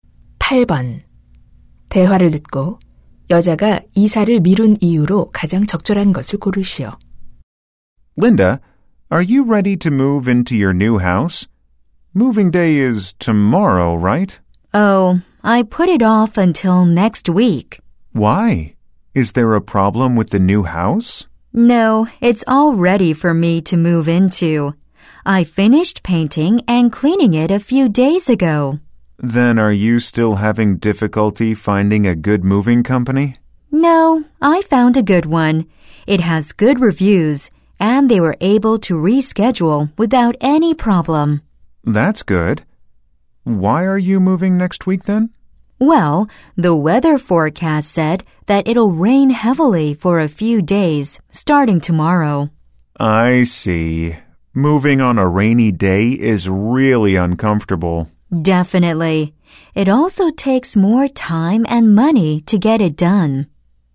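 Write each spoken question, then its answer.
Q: 대화를 듣고 여자가 이사를 미룬 이유로 가장 적절한 것을 고르시오.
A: 며칠간 비가 많이 올 예정이라서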